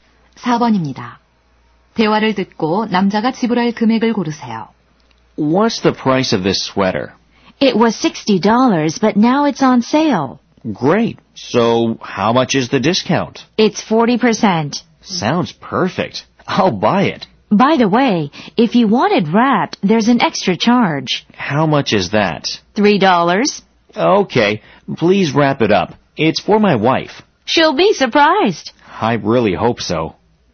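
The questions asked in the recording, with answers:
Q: 대화를 듣고 남자가 지불할 금액을 고르세요.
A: $39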